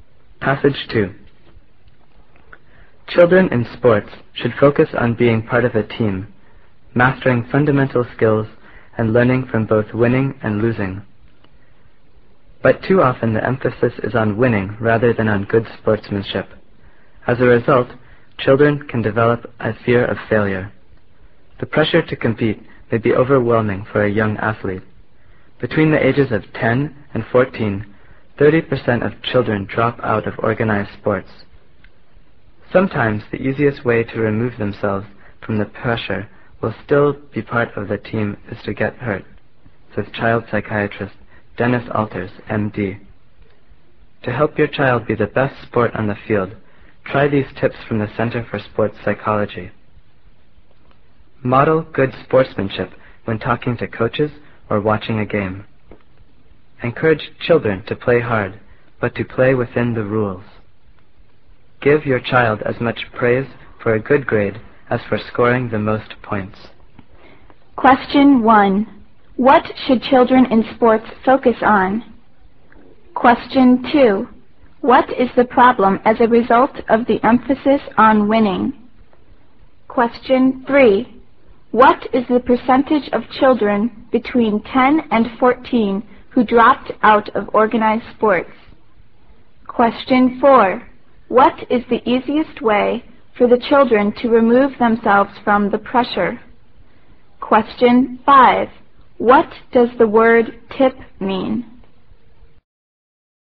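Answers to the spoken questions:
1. Being part of a team, mastering basic skills, and learning from winning and losing
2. Children can develop a fear of failure
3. 30%
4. To get hurt
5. A piece of advice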